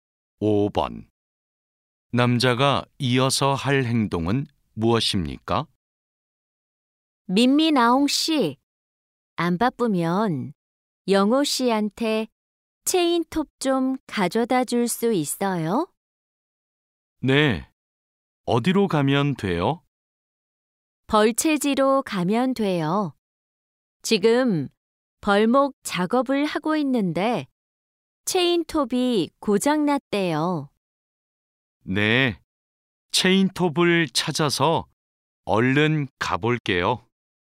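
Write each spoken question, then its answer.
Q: 남자가 이어서 할 행동은 무엇입니까?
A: 체인톱을 찾아서 벌채지로 가져다 준다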